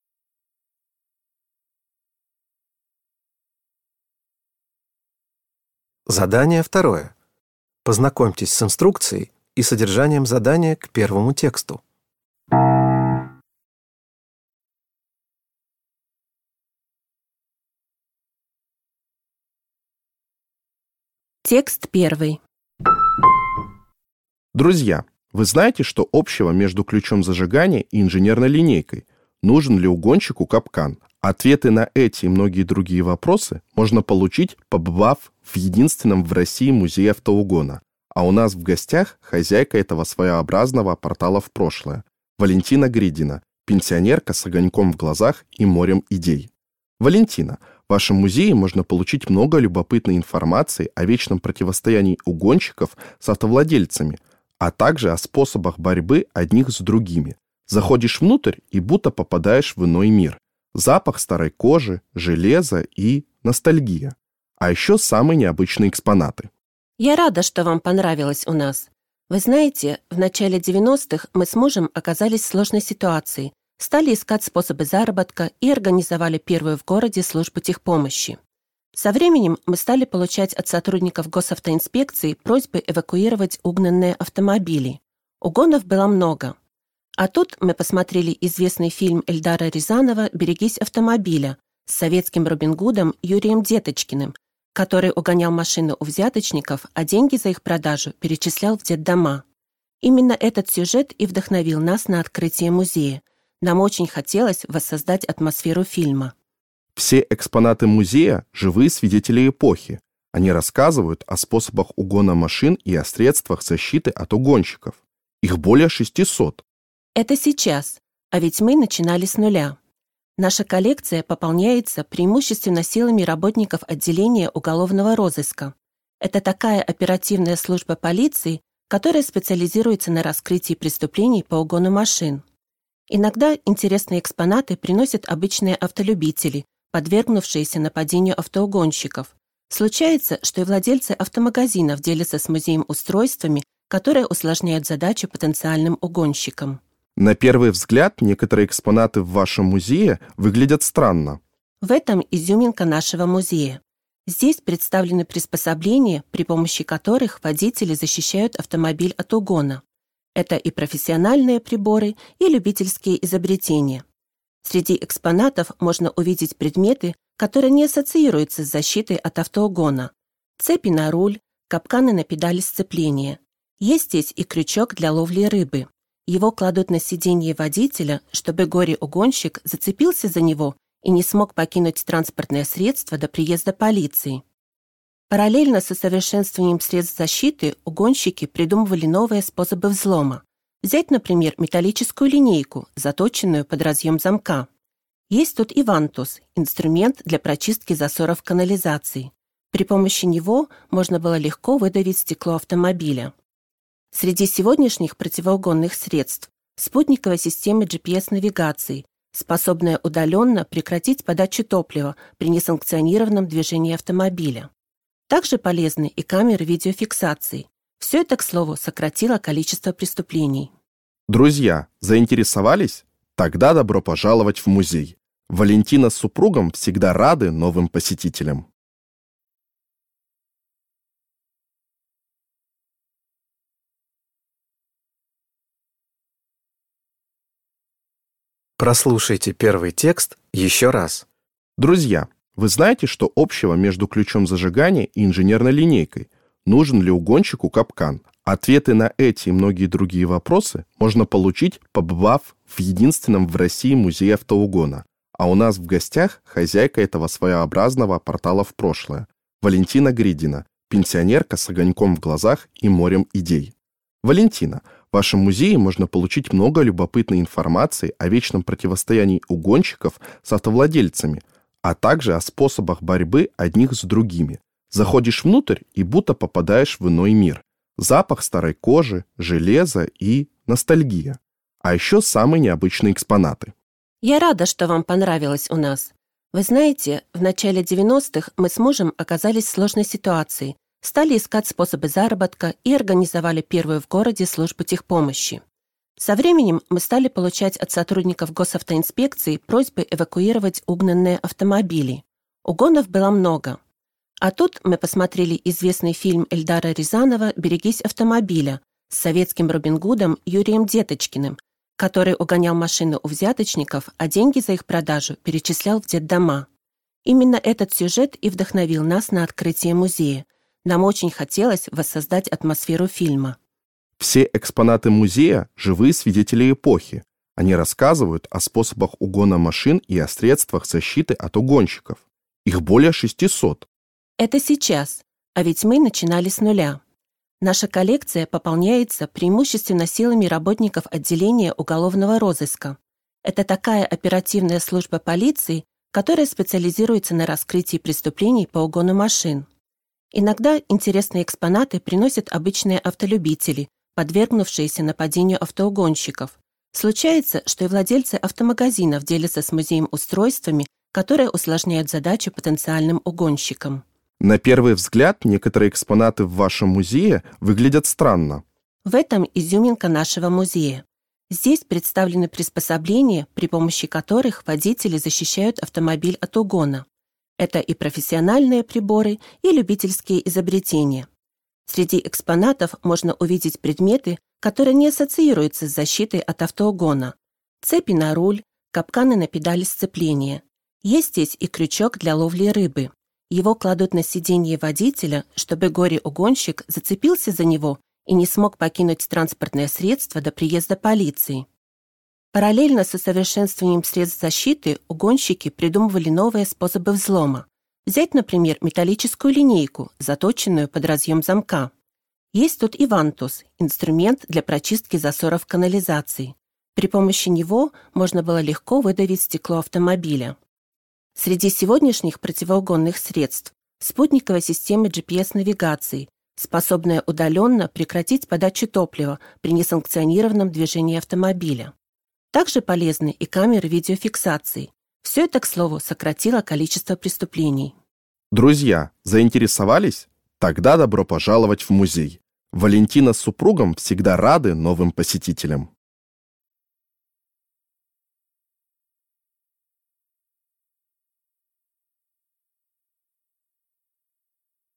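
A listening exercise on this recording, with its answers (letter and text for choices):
Прослушайте дважды два текста. Из предложенных ответов (A–D) выберите правильный ответ, соответствующий содержанию текста, и обведите его кружком. Задания 2.1.–2.3. относятся к первому тексту, а задания 2.4.–2.6. – ко второму.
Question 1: Созданием Музея автоугона Валентина Гридина и её муж занялись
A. под влиянием популярной кинокартины.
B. по совету сотрудников госавтоинспекции.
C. вследствие намерения изменить сферу деятельности.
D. с целью показать водителям способы защиты от преступников.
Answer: A. под влиянием популярной кинокартины.

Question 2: Большинство экспонатов Музея автоугона получены Гридиными от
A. хозяев автосалонов.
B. владельцев автомобилей.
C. работников службы техпомощи.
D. сотрудников правоохранительных органов.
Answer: D. сотрудников правоохранительных органов.

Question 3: Рыболовный крючок использовали для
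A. взлома дверей автомобиля.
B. блокировки стеклоподъёмников.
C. задержания преступника внутри машины.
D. запуска двигателя транспортного средства.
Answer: C. задержания преступника внутри машины.

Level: dwujęzyczny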